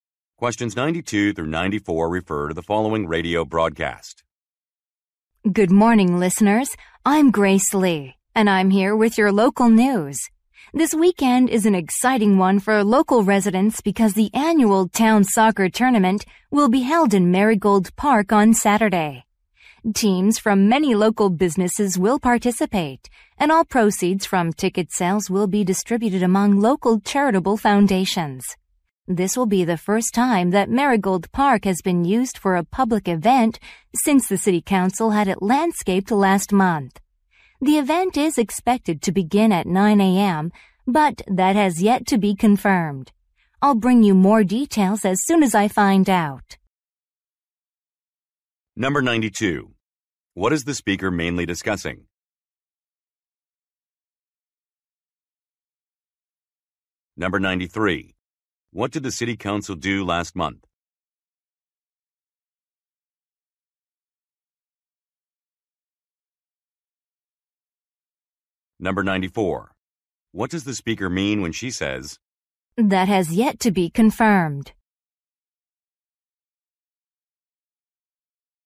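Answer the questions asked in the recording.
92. A local soccer tournament
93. Had Marigold Park landscaped
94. The start time may change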